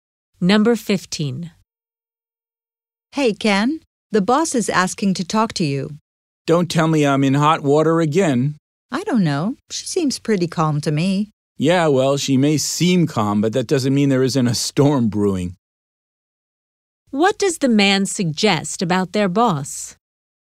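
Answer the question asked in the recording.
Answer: She may be angry even though she seems calm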